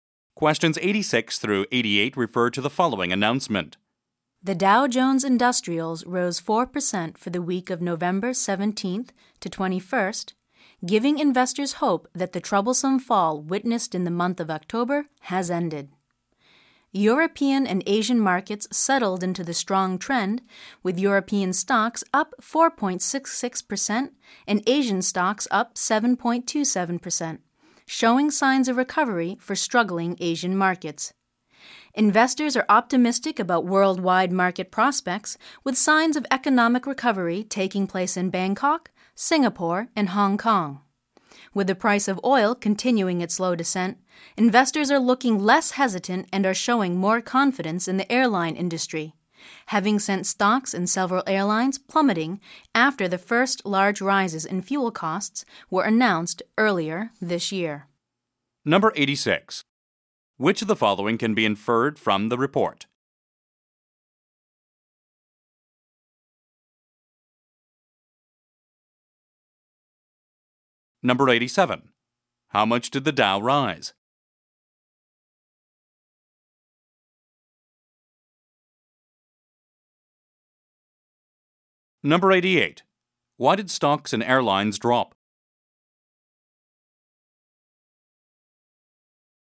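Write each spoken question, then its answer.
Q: Why did stocks and airlines drop?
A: Because of large rises in fuel costs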